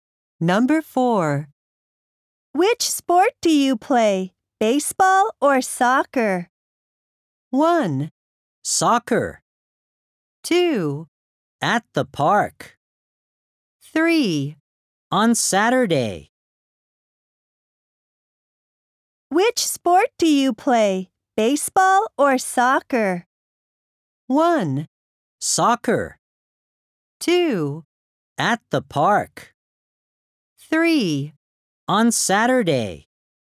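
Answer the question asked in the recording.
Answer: 1: Soccer.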